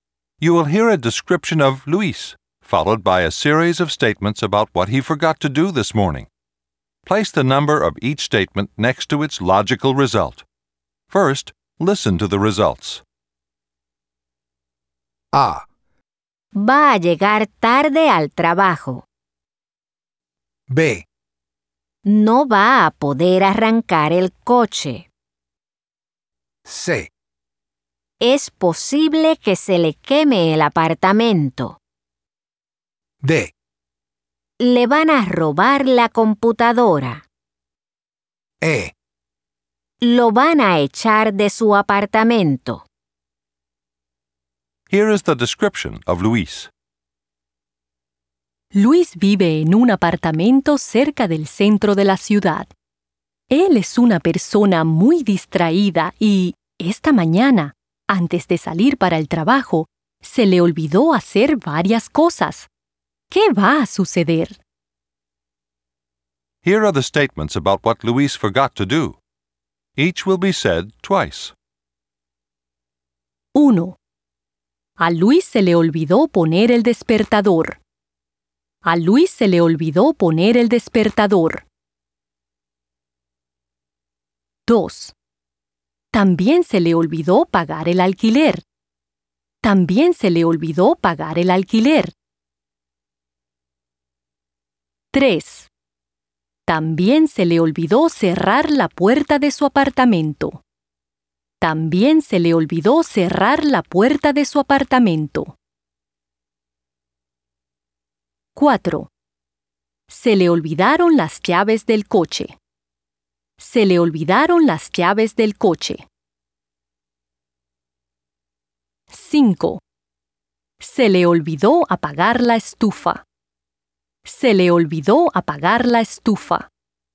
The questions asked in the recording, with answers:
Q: A Luis se le olvidó poner el despertador.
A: A. 1.

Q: También se le olvidó pagar el alquiler.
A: E. 2.

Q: También se le olvidó cerrar la puerta de su apartamento.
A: D. 3.

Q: Se le olvidaron las llaves del coche.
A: B. 4.

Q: Se le olvidó apagar la estufa.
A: C. 5.